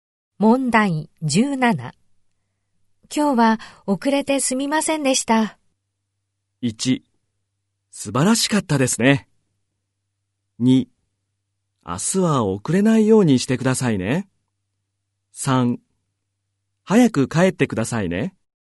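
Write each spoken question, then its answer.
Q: 今日は遅れてすみませんでした。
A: 2: 明日は遅れないようにしてくださいね。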